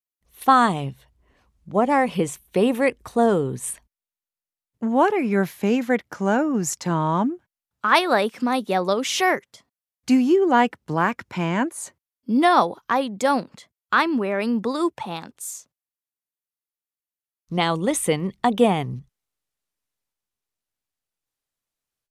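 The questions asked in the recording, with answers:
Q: What are his favorite clothes?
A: His yellow shirt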